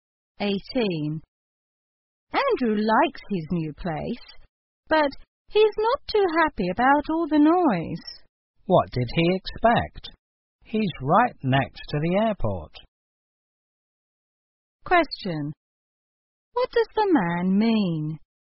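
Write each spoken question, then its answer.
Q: What does the man mean?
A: Andrew should have expected noise because he lives next to the airport.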